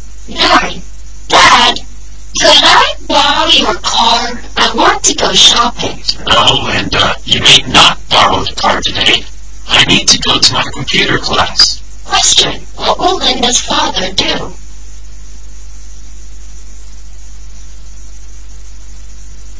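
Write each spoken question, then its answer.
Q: Question, what will Linda's father do?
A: Go to his computer class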